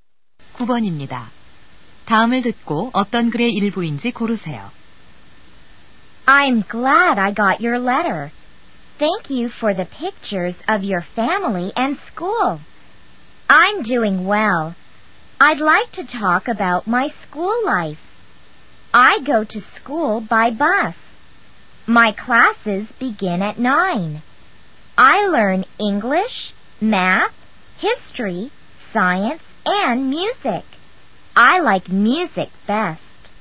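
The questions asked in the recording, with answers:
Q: 다음을 듣고 어떤 글의 일부인지 고르세요.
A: 편지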